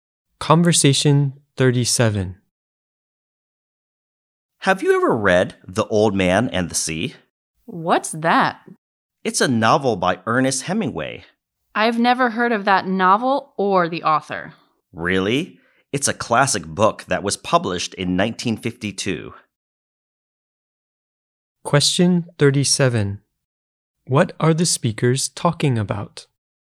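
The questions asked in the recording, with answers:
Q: What are the speakers talking about?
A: A novel, The Old Man and the Sea by Ernest Hemingway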